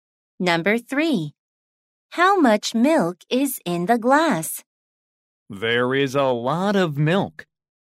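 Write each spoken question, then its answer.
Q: How much milk is in the glass?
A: a lot of milk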